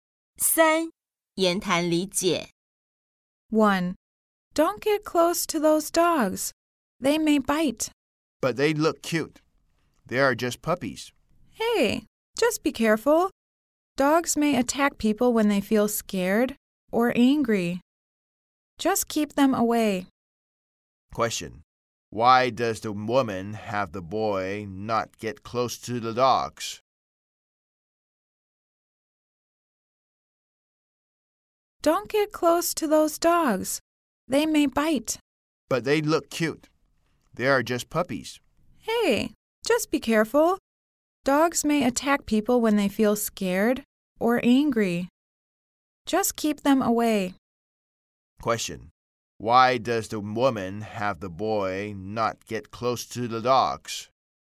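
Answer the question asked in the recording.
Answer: The dogs may bite.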